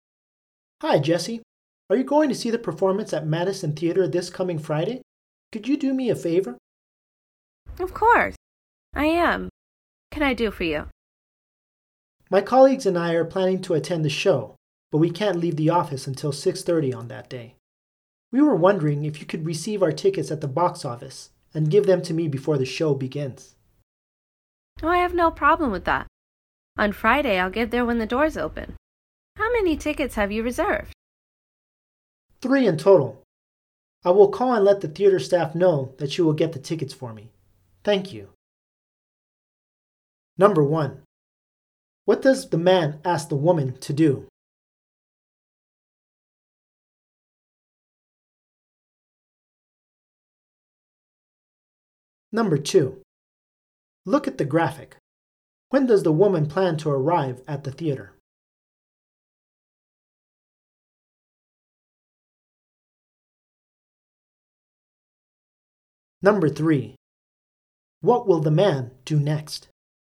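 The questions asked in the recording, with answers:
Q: What does the man ask the woman to do?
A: Pick up his tickets at the box office and give them to him before the show

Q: What will the man do next?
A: Call the theater to tell the staff she will get the tickets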